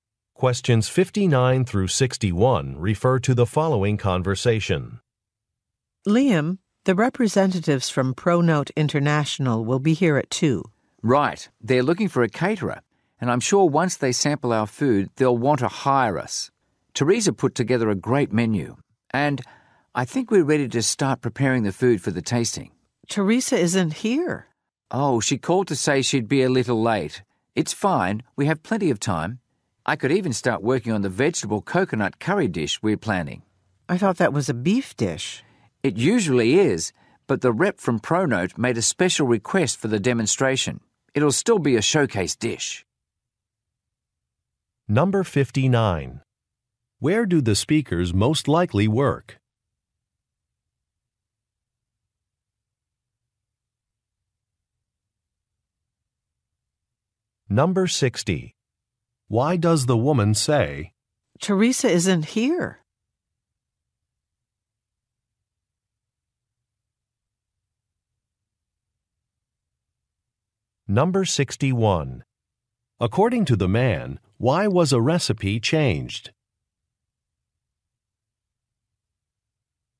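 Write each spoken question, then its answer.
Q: Where do the speakers most likely work?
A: At a catering company

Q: According to the man, why was a recipe changed?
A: A client representative made a special request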